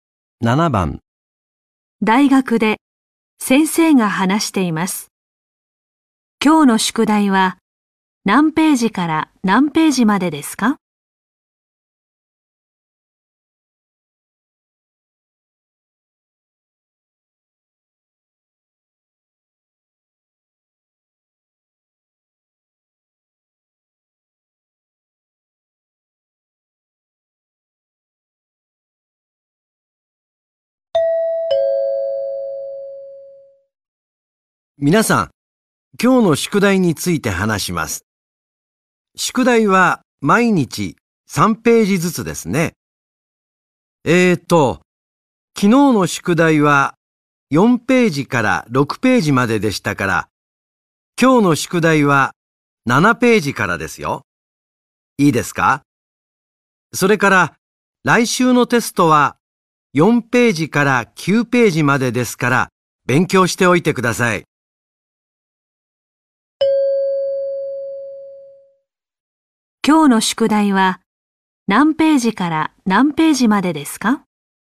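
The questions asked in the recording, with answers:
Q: 今日の宿題は何ページから何ページまでですか?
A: 7ページから9ページまで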